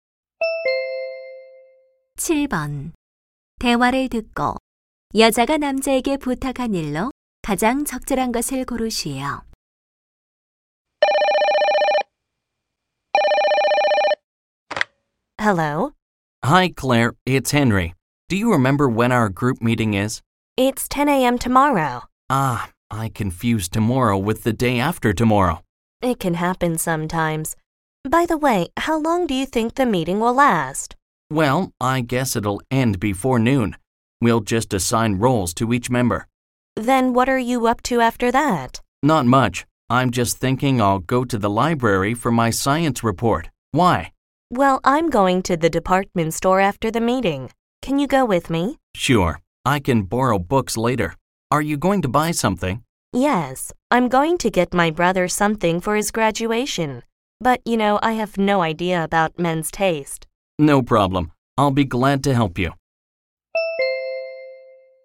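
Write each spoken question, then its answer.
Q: 대화를 듣고 여자가 남자에게 부탁한 일로 가장 적절한 것을 고르시오.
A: 백화점에 함께 가서 남동생 선물 고르기 도와주기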